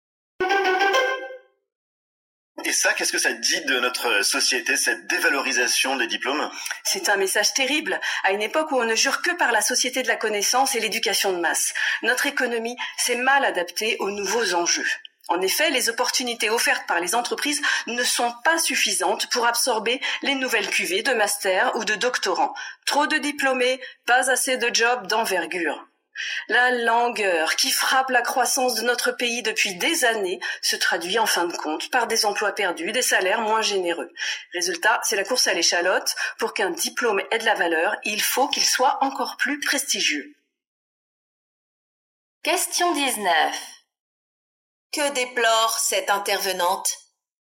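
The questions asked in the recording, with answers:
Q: Que déplore cette intervenante?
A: La dévalorisation des diplômes, faute d'emplois suffisants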